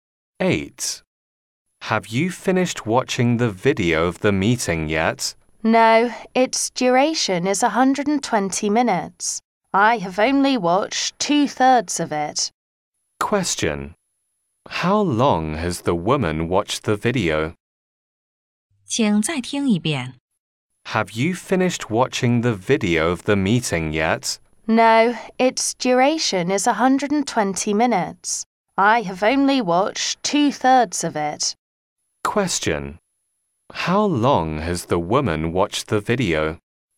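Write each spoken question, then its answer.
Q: How long has the woman watched the video?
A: 80 minutes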